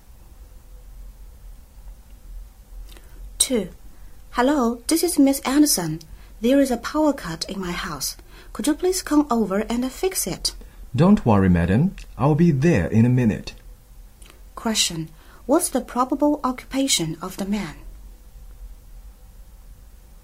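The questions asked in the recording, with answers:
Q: What's the probable occupation of the man?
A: An electrician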